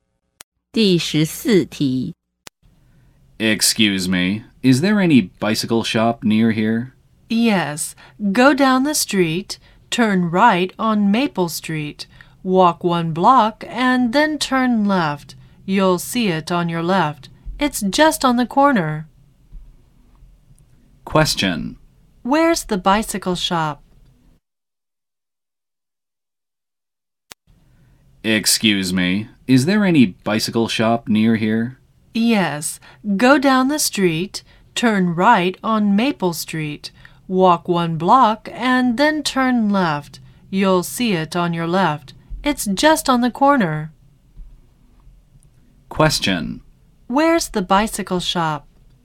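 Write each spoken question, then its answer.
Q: Where's the bicycle shop?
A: Turn right on Maple Street, walk one block, turn left; it's on the left, on the corner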